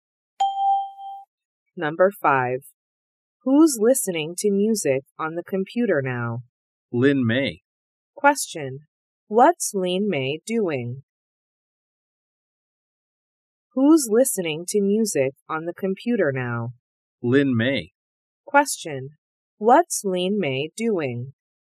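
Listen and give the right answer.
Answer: Listening to music on the computer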